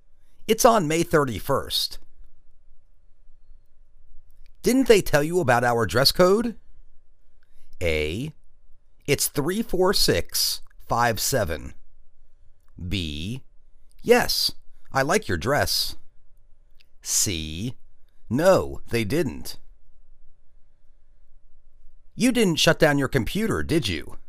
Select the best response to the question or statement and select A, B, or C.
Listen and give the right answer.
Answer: No, they didn't.